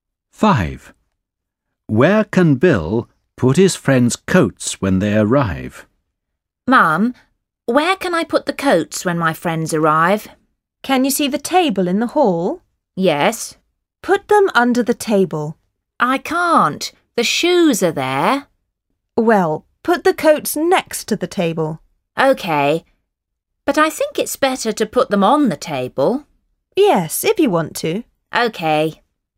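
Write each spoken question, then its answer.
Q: Where can Bill put his friends' coats when they arrive?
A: On the table in the hall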